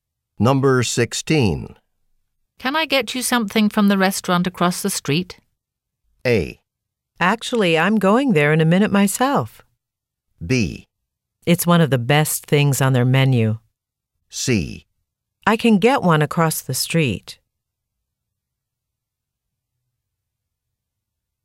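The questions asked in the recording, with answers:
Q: Can I get you something from the restaurant across the street?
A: A: Actually, I'm going there in a minute myself.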